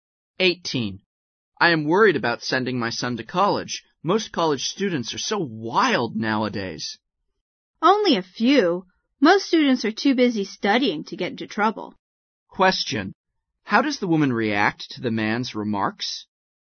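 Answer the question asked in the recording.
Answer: She disagrees; only a few students are wild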